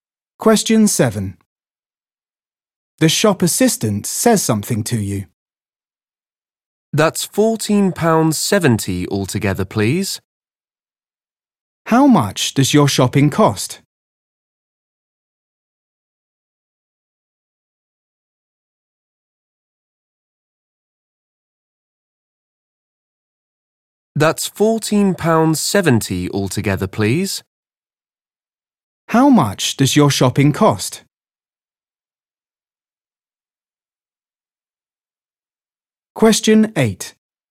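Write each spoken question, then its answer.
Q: How much does your shopping cost?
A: £14.70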